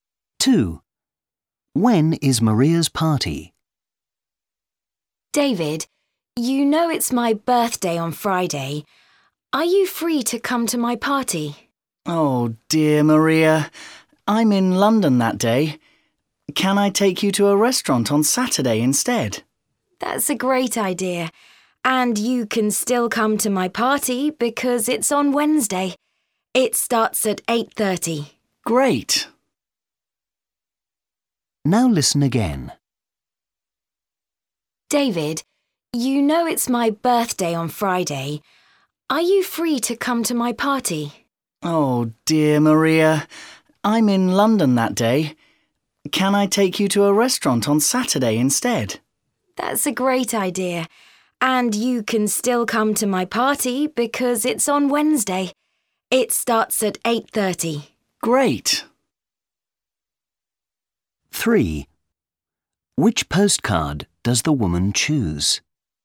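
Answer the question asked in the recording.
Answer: on Wednesday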